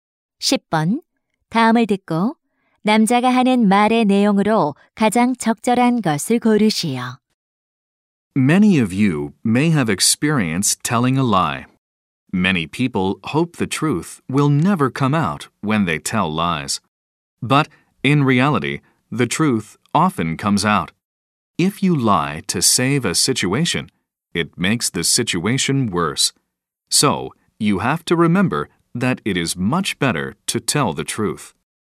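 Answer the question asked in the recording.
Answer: 거짓말보다 진실을 말하는 것이 낫다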